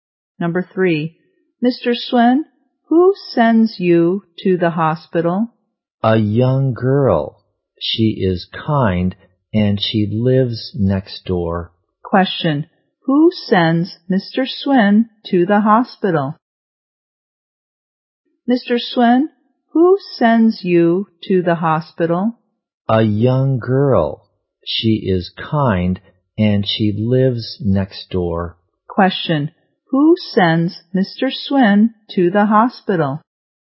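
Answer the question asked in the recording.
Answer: A young girl who lives next door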